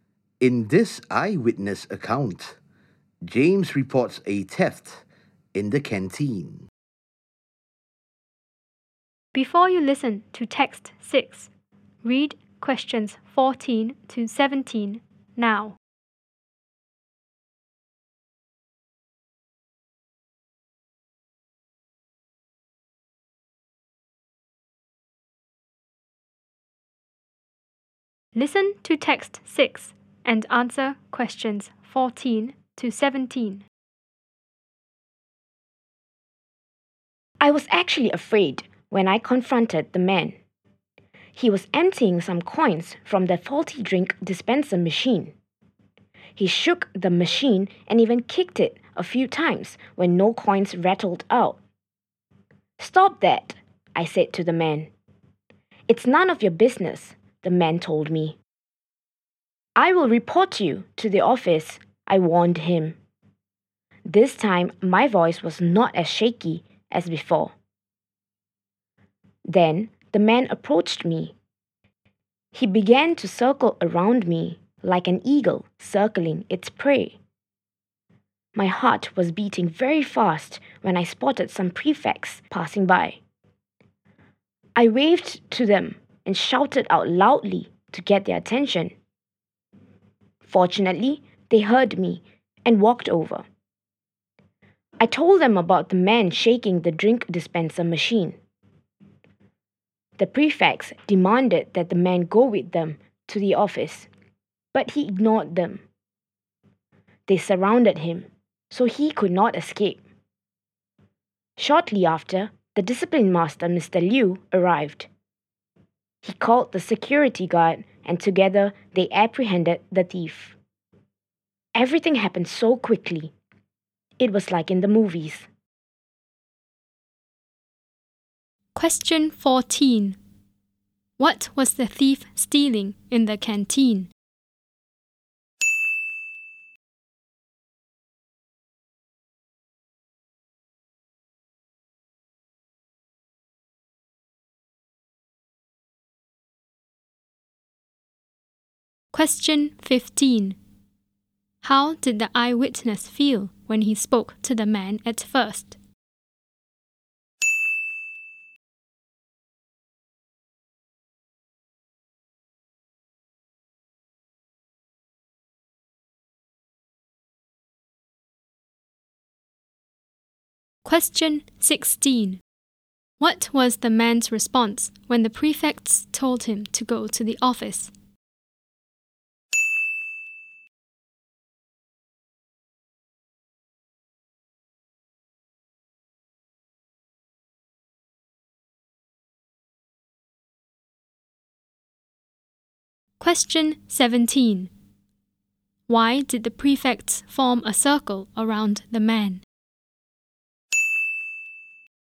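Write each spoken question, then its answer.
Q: What was the thief stealing in the canteen?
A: Coins from the drink dispenser machine

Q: How did the eyewitness feel when he spoke to the man at first?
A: Afraid

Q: What was the man's response when the prefects told him to go to the office?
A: He ignored them

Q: Why did the prefects form a circle around the man?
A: So he could not escape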